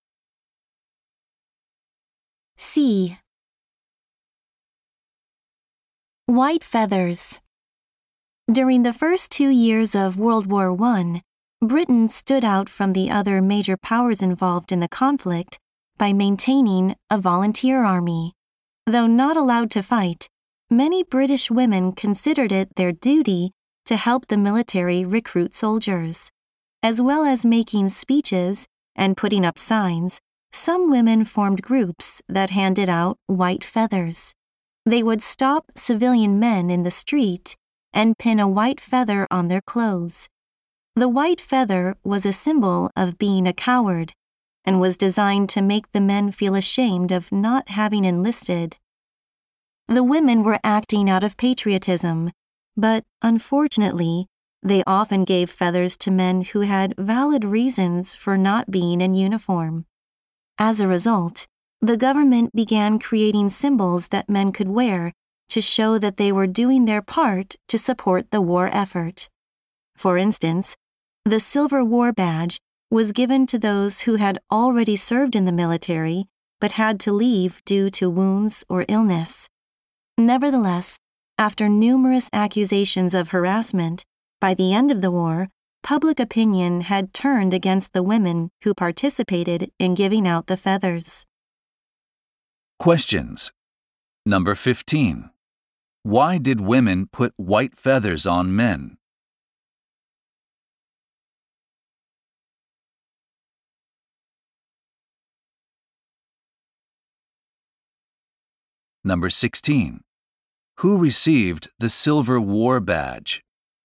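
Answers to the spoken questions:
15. To shame them into joining the army
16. Men who had served but left due to wounds or illness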